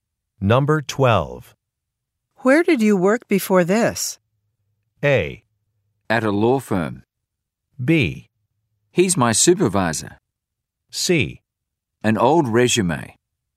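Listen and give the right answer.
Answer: A: At a law firm.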